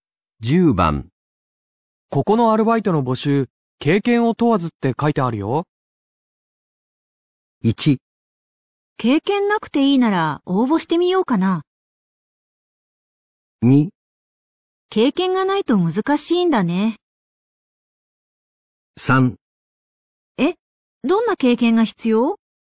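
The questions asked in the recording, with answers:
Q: ここのアルバイトの募集、経験を問わずって書いてあるよ。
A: 1: 経験なくていいなら応募してみようかな。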